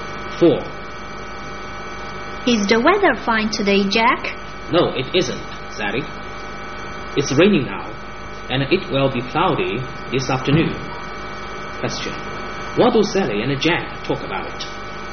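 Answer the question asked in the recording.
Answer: The weather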